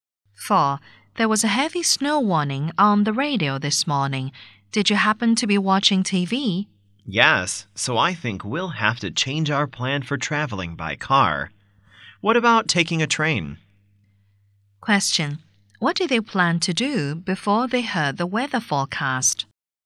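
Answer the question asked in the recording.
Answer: Travel by car.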